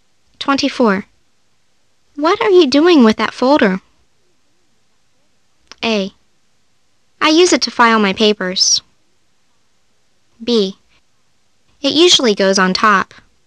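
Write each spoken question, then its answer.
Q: What are you doing with that folder?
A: A: I use it to file my papers.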